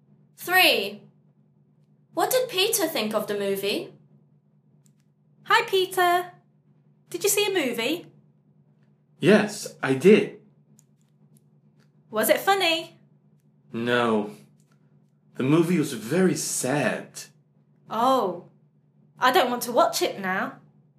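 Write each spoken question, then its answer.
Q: What did Peter think of the movie?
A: It was very sad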